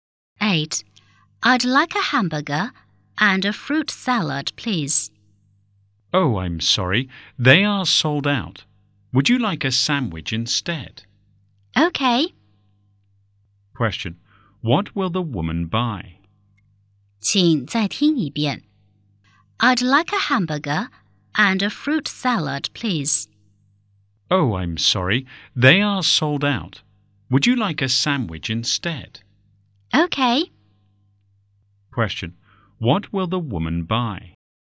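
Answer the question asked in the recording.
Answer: A sandwich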